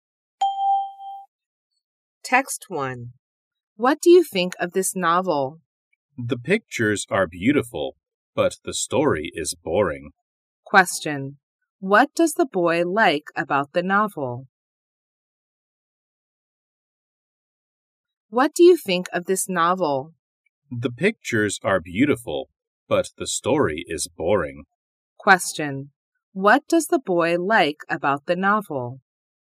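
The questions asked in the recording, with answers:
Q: What does the boy like about the novel?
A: The pictures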